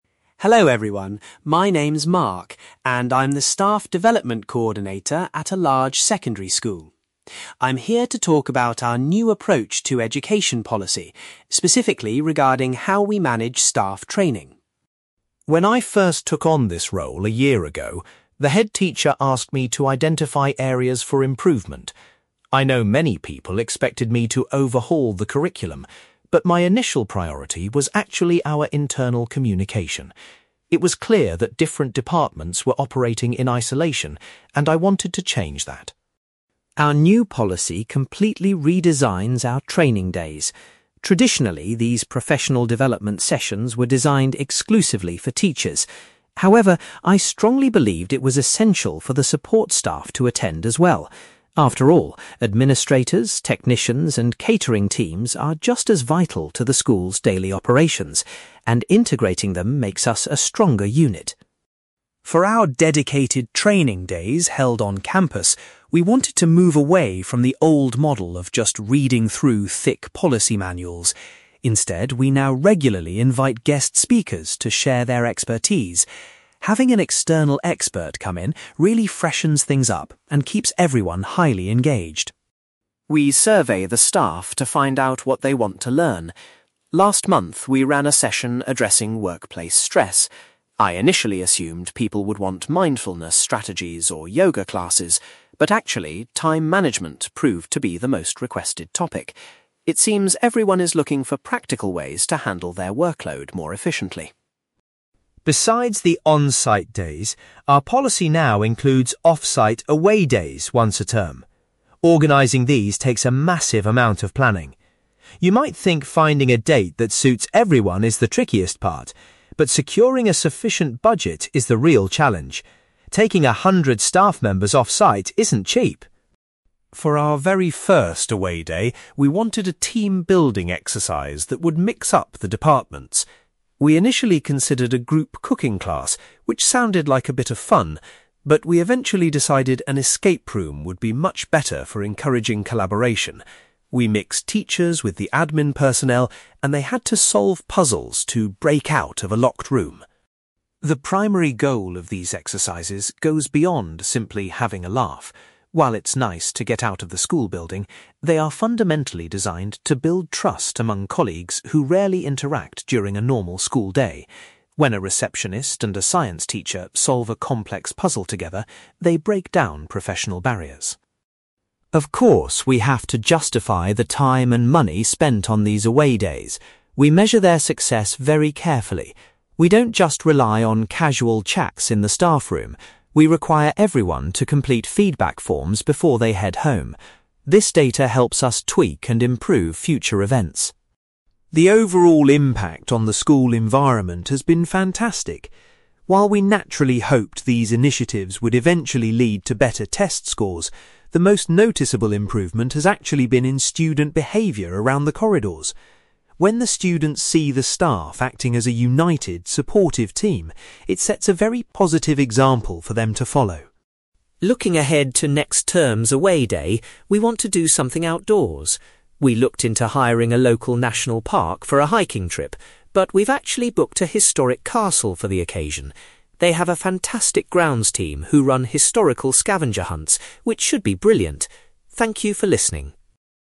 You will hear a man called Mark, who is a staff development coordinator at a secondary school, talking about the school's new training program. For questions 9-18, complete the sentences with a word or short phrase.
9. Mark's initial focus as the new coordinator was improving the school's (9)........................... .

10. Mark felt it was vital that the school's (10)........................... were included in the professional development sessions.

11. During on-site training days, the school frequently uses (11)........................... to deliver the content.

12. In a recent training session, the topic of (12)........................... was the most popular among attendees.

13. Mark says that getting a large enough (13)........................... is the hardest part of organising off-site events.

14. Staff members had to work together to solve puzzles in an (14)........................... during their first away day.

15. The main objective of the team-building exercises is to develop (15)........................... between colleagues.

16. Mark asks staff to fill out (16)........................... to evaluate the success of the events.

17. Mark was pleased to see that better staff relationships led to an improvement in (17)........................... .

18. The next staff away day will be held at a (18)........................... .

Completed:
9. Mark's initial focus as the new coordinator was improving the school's internal communication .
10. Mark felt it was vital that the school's support staff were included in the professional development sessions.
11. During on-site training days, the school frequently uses guest speakers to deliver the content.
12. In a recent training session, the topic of time management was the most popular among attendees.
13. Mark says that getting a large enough budget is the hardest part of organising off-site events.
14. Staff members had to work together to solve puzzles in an escape room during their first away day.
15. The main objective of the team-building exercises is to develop trust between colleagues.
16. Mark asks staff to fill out feedback forms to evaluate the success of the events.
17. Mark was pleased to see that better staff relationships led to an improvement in student behaviour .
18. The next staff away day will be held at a historic castle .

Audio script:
Mark: Hello everyone, my name is Mark, and I'm the Staff Development Coordinator at a large secondary school. I'm here to talk about our new approach to education policy, specifically regarding how we manage staff training.
When I first took on this role a year ago, the headteacher asked me to identify areas for improvement. I know many people expected me to overhaul the curriculum, but my initial priority was actually our internal communication. It was clear that different departments were operating in isolation, and I wanted to change that.
Our new policy completely redesigns our training days. Traditionally, these professional development sessions were designed exclusively for teachers. However, I strongly believed it was essential for the support staff to attend as well. After all, administrators, technicians, and catering teams are just as vital to the school's daily operations, and integrating them makes us a stronger unit.
For our dedicated 'training days' held on campus, we wanted to move away from the old model of just reading through thick policy manuals. Instead, we now regularly invite guest speakers to share their expertise. Having an external expert come in really freshens things up and keeps everyone highly engaged.
We survey the staff to find out what they want to learn. Last month, we ran a session addressing workplace stress. I initially assumed people would want mindfulness strategies or yoga classes, but actually, time management proved to be the most requested topic. It seems everyone is looking for practical ways to handle their workload more efficiently!
Besides the on-site days, our policy now includes off-site 'away days' once a term. Organising these takes a massive amount of planning. You might think finding a date that suits everyone is the trickiest part, but securing a sufficient budget is the real challenge. Taking a hundred staff members off-site isn't cheap!
For our very first away day, we wanted a team-building exercise that would mix up the departments. We initially considered a group cooking class, which sounded like a bit of fun. But we eventually decided an escape room would be much better for encouraging collaboration. We mixed teachers with the admin personnel, and they had to solve puzzles to 'break out' of a locked room.
The primary goal of these exercises goes beyond simply having a laugh. While it's nice to get out of the school building, they are fundamentally designed to build trust among colleagues who rarely interact during a normal school day. When a receptionist and a science teacher solve a complex puzzle together, it breaks down professional barriers.
Of course, we have to justify the time and money spent on these away days. We measure their success very carefully. We don't just rely on casual chats in the staffroom; we require everyone to complete feedback forms before they head home. This data helps us tweak and improve future events.
The overall impact on the school environment has been fantastic. While we naturally hoped these initiatives would eventually lead to better test scores, the most noticeable improvement has actually been in student behaviour around the corridors. When the students see the staff acting as a united, supportive team, it sets a very positive example for them to follow.
Looking ahead to next term's away day, we want to do something outdoors. We looked into hiring a local national park for a hiking trip, but we've actually booked a historic castle for the occasion. They have a fantastic grounds team who run historical scavenger hunts, which should be brilliant. Thank you for listening!

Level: B2